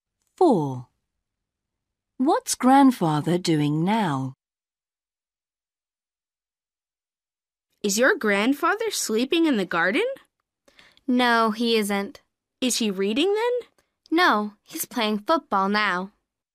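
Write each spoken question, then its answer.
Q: What's Grandfather doing now?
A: playing football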